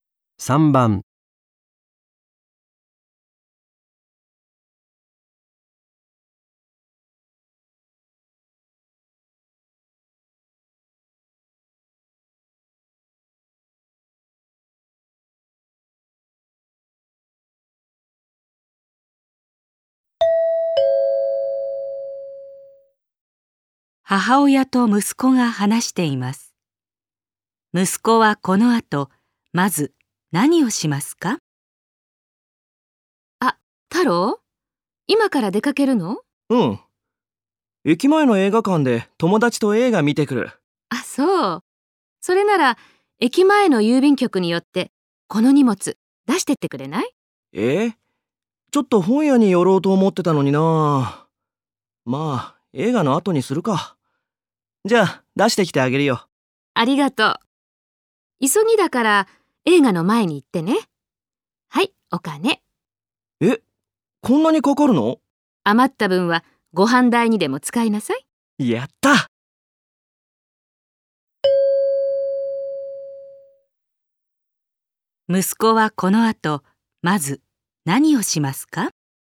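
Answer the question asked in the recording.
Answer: 郵便局に行って荷物を出す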